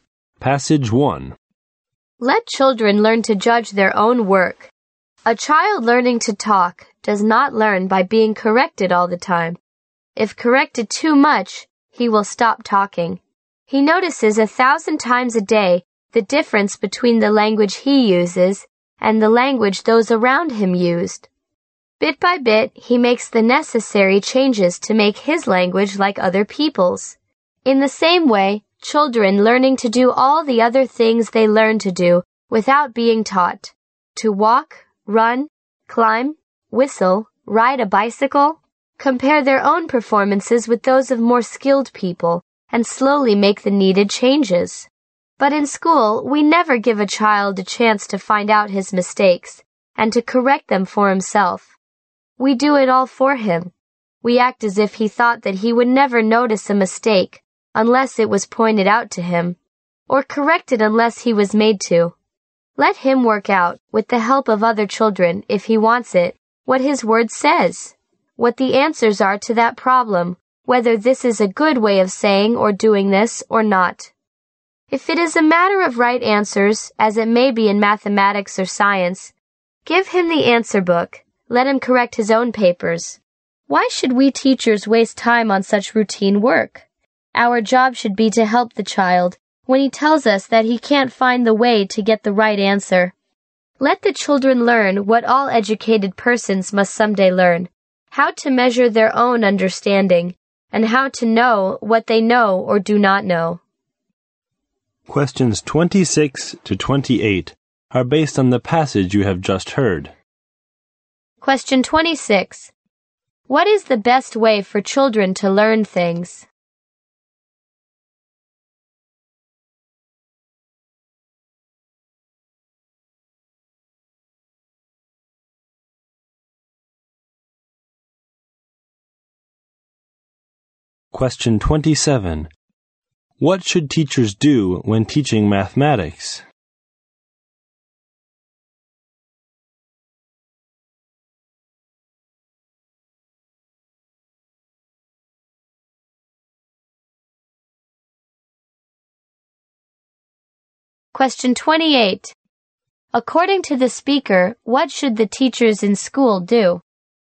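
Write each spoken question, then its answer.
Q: What is the best way for children to learn things?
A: Compare their performance with more skilled people and correct themselves

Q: What should teachers do when teaching mathematics?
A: Give children the answer book and let them correct their own papers

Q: According to the speaker, what should the teachers in school do?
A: Help the child only when he can't find the way to the right answer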